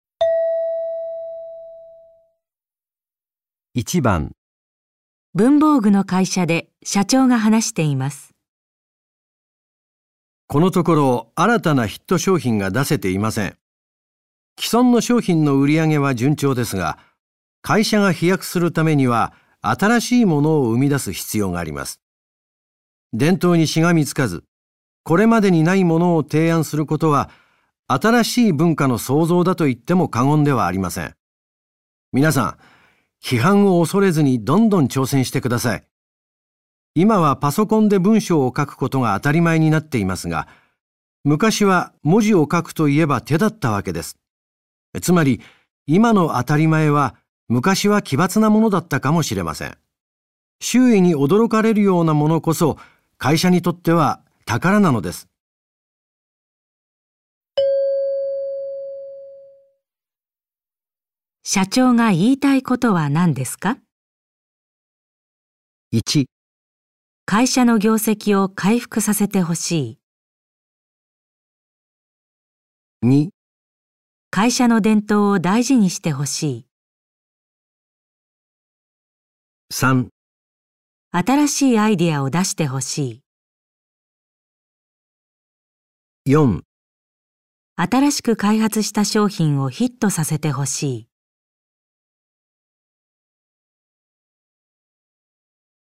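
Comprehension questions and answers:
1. 社長が言いたいことはなんですか。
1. 会社の業績を回復させてほしい。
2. 会社の伝統を大事にしてほしい。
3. 新しいアイディアを出してほしい。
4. 新しく開発した商品をヒットさせてほしい。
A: 新しいアイディアを出してほしい。

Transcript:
みなさん、 批判を恐れずにどんどん挑戦してください。 今はパソ コンで文章を書くことが当たり前になっていますが、 昔は文字を書くといえば手だったわけです。 つまり、今の 当たり前は、昔は奇抜なものだったかもしれません。 周囲に驚かれるようなものこそ、会社にとっては宝なので
す。
質問:社長が言いたいことはなんですか。

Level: N1

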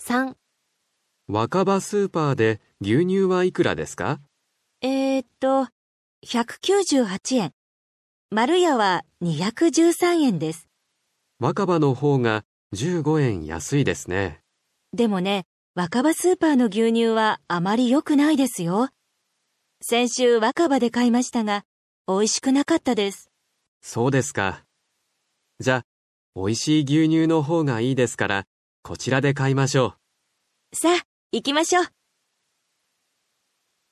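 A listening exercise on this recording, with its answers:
どちらの スーパーで 買いますか。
牛乳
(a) わかば スーパー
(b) まるや スーパー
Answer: まるや スーパー

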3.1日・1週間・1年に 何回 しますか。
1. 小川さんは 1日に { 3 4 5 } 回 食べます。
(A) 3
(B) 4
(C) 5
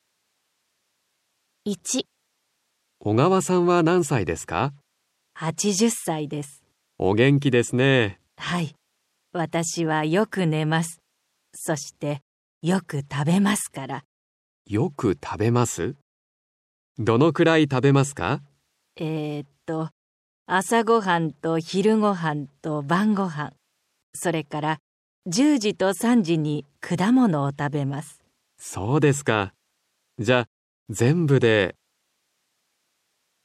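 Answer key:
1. 5

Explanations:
B: えーと、 朝ごはんと 昼ごはんと 晩ごはん、 それから 10時と 3時に 果物を食べます。

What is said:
B: えーと、 朝ごはんと 昼ごはんと 晩ごはん、

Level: N5

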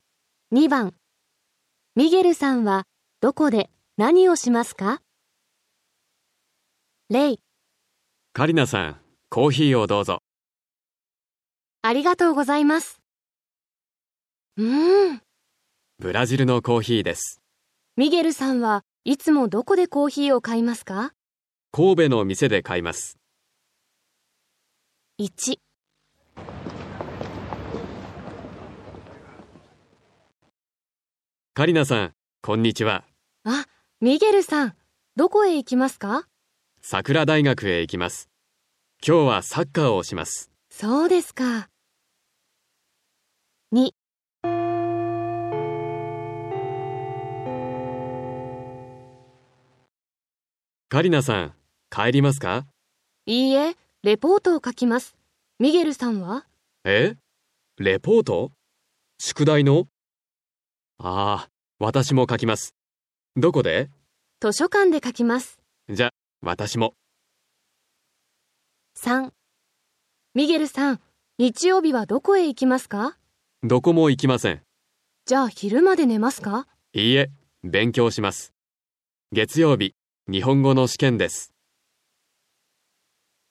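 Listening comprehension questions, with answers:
2.ミゲルさんは どこで なにを しますか。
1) ( さくら大学)でサッカーを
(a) 見ます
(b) します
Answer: します

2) (図書館)でレポートを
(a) 書きます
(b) 読みます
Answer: 書きます

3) (うち)で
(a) 寝ます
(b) 勉強します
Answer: 勉強します

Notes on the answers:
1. A: カリナさん、 こんにちは。 B: あ、 ミゲルさん。 どこへ 行きますか。 A: さくら大学へ 行きます。 今日は サッカーを します。 B: そうですか。
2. A: カリナさん、 帰りますか。 B: いいえ、 レポートを 書きます。 ミゲルさんは? A: えーつ? レポート? 宿題の? ああ、 私も 書きます。 どこで? B: 図書館で 書きます。 A: じゃ、 わたしも。
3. B: ミゲルさん、 日曜日は どこへ 行きますか。 A: どこも 行きません。 B: じゃ、 昼まで 寝ますか。 A: いいえ、 勉強します。 月曜日 日本語の 試験です。

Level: N5

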